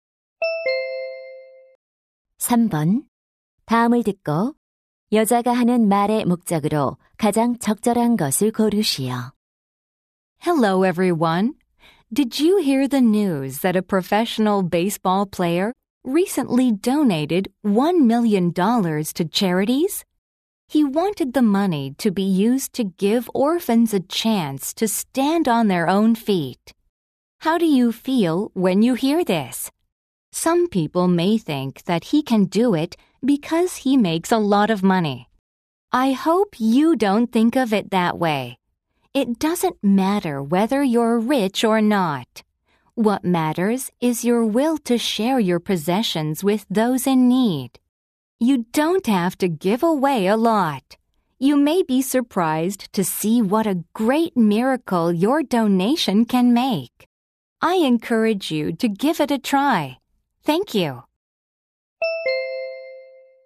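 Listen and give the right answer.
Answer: 기부 참여를 권장하려고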